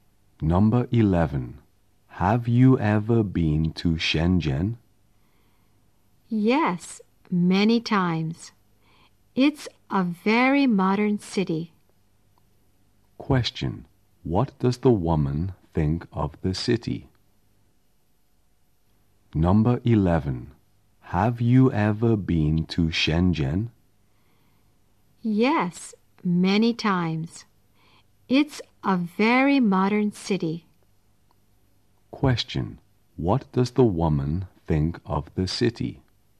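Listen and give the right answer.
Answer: It's a very modern city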